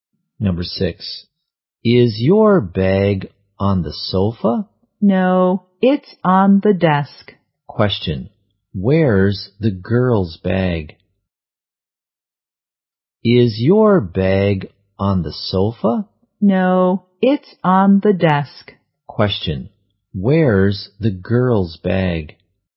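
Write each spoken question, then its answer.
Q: where's the girl's bag?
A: On the desk.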